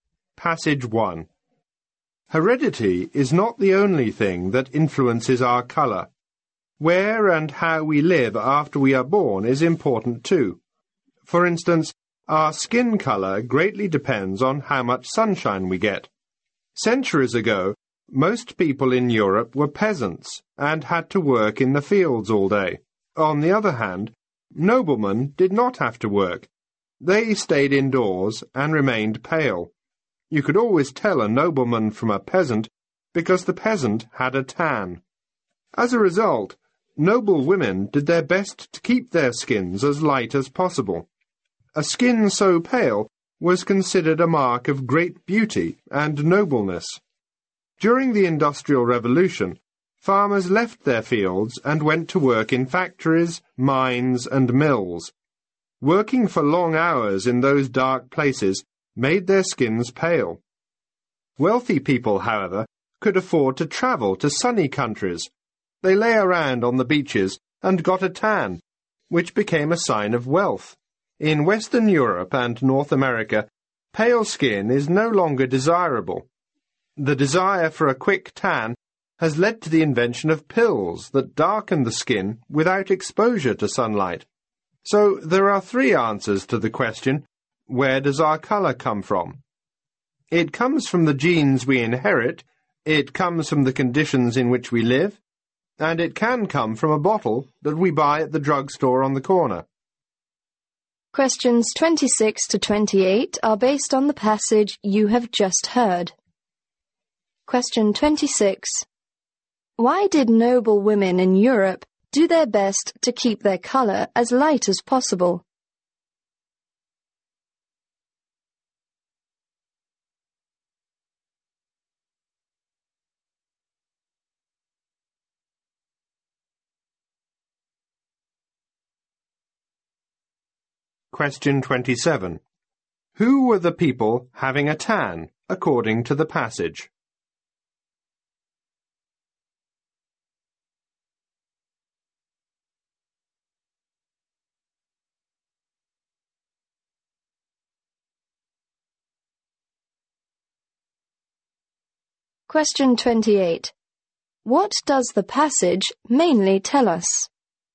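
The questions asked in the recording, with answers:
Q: Why did noble women in Europe do their best to keep their color as light as possible?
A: Pale skin was considered a mark of great beauty and nobleness.

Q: What does the passage mainly tell us?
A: Where our skin color comes from.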